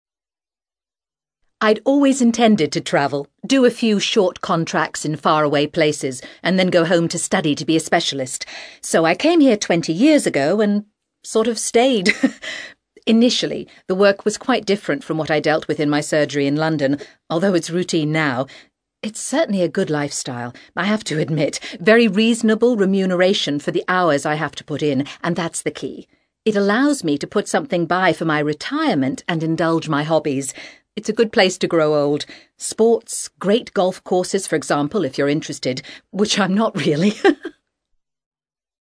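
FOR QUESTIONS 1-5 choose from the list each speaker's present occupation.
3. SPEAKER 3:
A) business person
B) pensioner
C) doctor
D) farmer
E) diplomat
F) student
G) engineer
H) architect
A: C

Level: CAE

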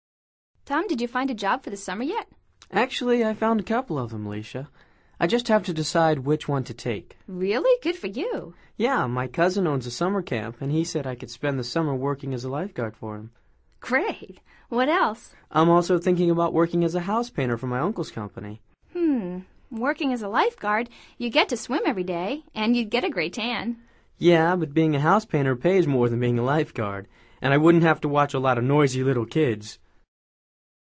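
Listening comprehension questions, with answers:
Escucha atentamente esta conversación entre Alicia y Tom y selecciona la respuesta más adecuada de acuerdo con tu comprensión auditiva. No verifiques las respuestas de este ejercicio hasta finalizarlo.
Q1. Working as a housepainter, Tom would be able to ...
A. get a great tan.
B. earn more than a lifeguard.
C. work with children.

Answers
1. B

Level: Nivel Avanzado

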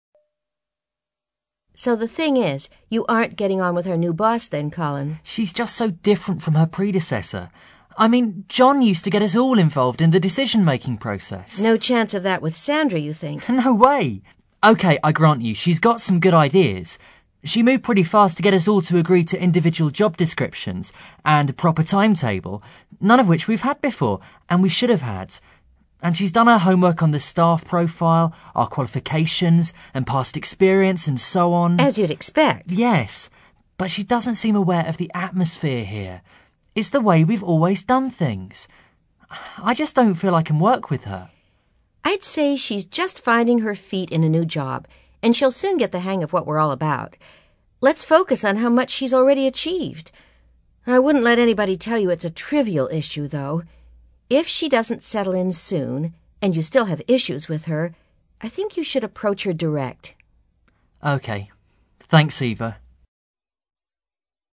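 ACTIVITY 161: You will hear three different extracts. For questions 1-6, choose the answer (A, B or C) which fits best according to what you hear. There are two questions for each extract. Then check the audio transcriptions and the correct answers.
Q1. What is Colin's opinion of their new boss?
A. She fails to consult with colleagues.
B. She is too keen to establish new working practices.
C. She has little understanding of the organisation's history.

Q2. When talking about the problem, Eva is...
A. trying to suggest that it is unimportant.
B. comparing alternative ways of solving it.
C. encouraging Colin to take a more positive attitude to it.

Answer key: 1C, 2C

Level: CAE Certificate in Advanced English

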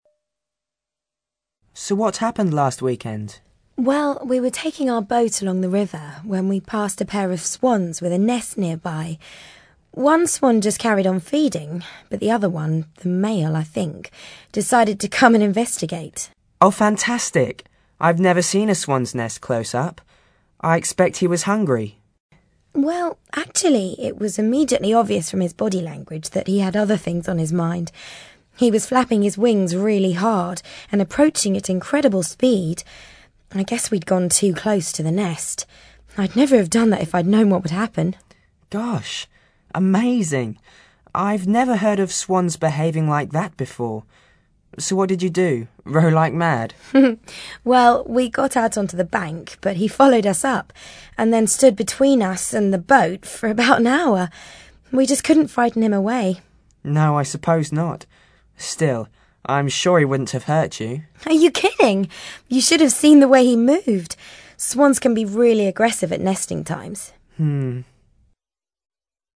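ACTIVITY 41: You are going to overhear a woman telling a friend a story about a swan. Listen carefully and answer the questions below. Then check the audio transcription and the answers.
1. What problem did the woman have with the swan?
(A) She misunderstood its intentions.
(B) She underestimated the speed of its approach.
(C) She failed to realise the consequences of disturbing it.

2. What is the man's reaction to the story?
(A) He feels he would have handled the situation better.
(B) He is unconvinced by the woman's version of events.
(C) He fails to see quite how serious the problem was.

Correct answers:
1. C
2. C

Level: CAE Certificate in Advanced English

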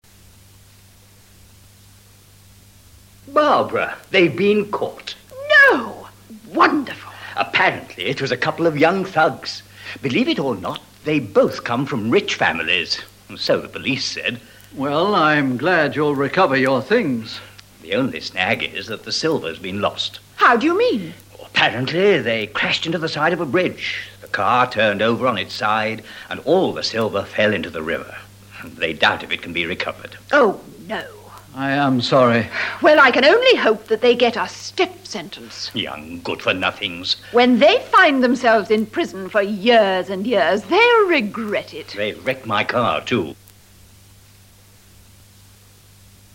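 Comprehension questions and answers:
WHILE LISTENING TO THE DIALOGUE AGAIN TRY TO COMPLETE THIS MULTIPLE CHOICE ACTIVITY.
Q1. Why is it difficult to get both things back?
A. Because the car was destroyed by fire.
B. Because the silver was lost and the car damaged.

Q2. How were both the car and the silver lost?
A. When the thieves crashed on the road, the silver was destroyed.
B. When the thieves crashed into a bridge, the car turned over and the silver fell into the river.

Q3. Where are the two thieves now?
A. Both thieves have been caught, so they are probably at the police-station.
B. Both thieves are in a prison near the river now.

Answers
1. B
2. B
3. A

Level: ADVANCED LEVEL

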